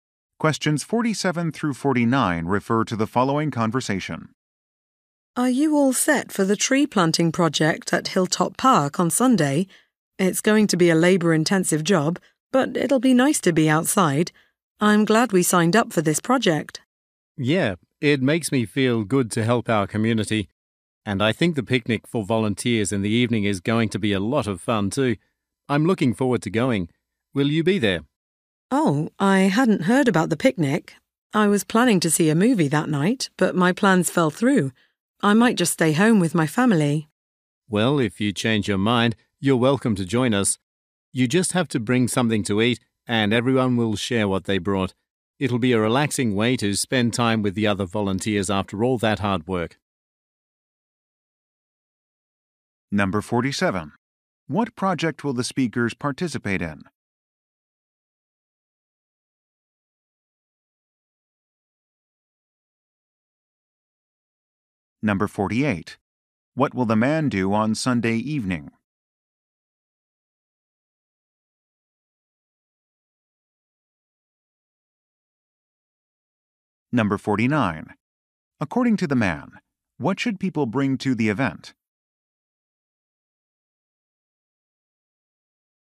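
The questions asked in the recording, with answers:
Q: What project will the speakers participate in?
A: Tree planting at Hilltop Park

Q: According to the man, what should people bring to the event?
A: Something to eat to share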